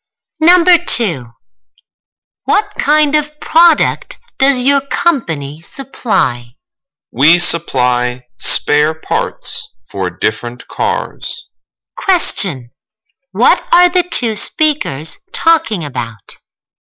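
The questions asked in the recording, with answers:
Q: What are the 2 speakers talking about?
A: Spare parts for cars the company supplies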